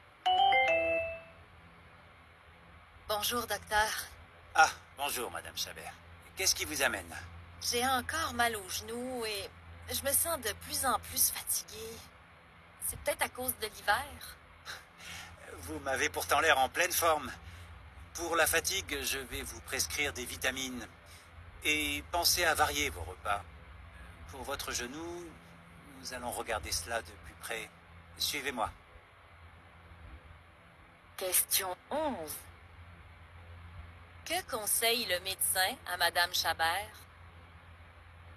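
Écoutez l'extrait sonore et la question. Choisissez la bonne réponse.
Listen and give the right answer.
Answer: De prendre des vitamines et de varier ses repas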